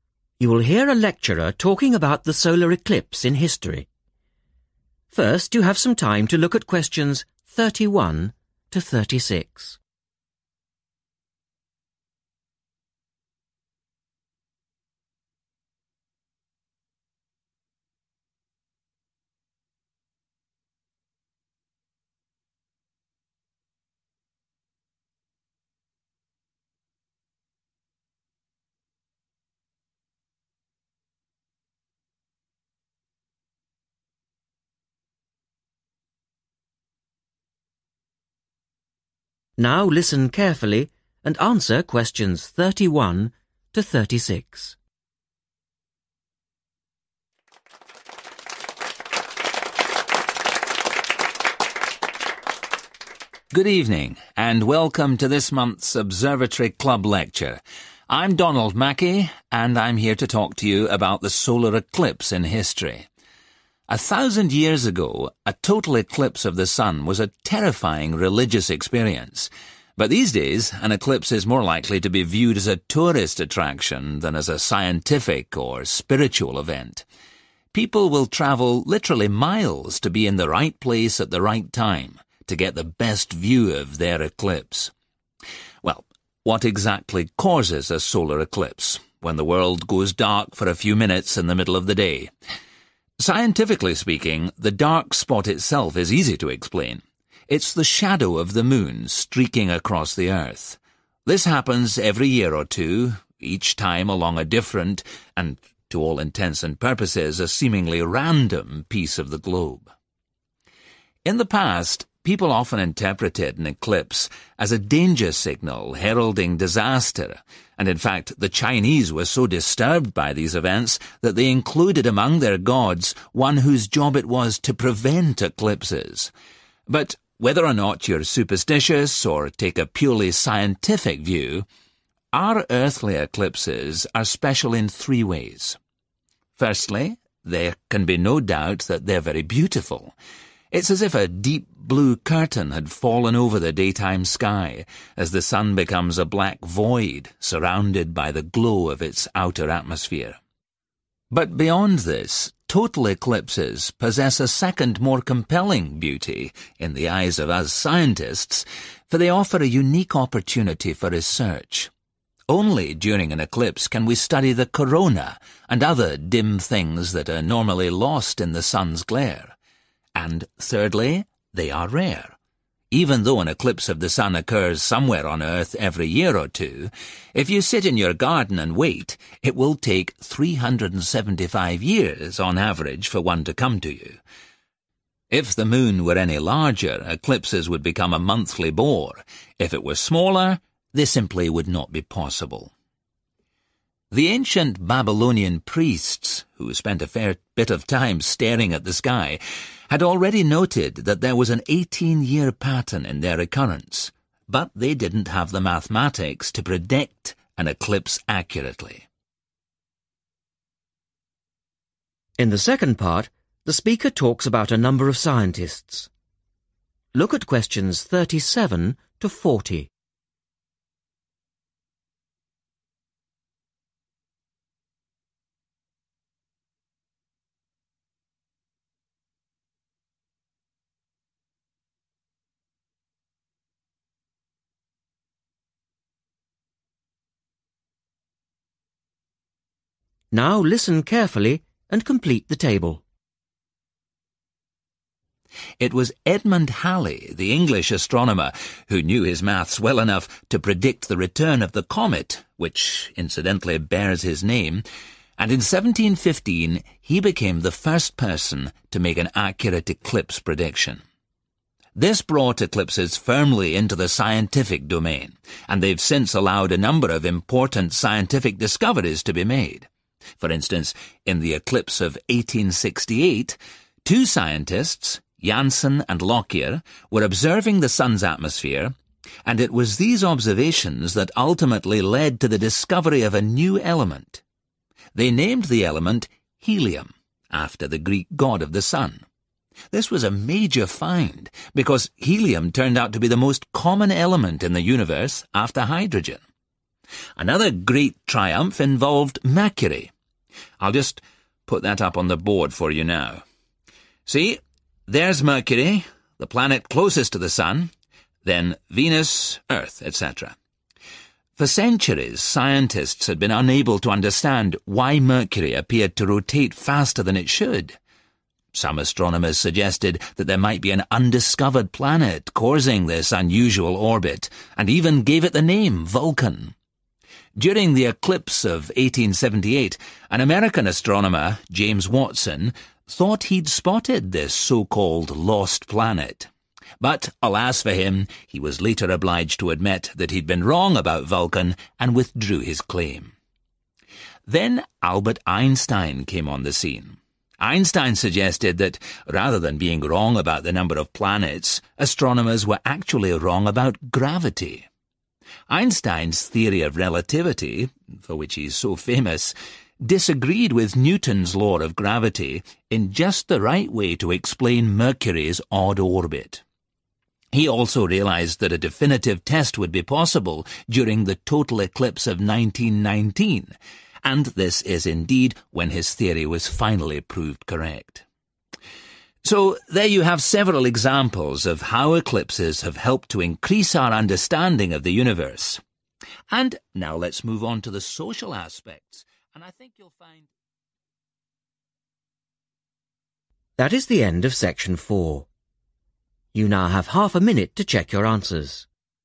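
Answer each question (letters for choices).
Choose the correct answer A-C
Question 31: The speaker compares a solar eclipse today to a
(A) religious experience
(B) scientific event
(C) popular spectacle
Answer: C

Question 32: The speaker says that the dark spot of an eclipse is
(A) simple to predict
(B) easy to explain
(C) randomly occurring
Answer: B

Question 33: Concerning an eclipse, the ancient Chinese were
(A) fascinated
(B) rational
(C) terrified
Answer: C

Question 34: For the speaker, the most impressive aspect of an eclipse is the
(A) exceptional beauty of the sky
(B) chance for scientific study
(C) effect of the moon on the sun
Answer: B

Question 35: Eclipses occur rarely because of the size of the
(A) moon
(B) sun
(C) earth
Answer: A

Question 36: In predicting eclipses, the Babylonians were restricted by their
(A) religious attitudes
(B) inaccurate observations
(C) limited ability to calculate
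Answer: C

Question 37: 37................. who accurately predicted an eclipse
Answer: first person

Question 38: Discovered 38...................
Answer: helium

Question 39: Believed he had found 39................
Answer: Vulcan

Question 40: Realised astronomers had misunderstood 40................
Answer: gravity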